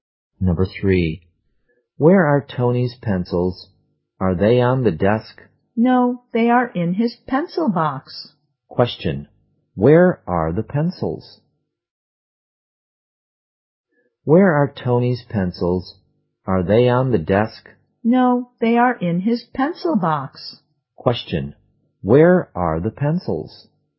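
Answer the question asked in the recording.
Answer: In his pencil box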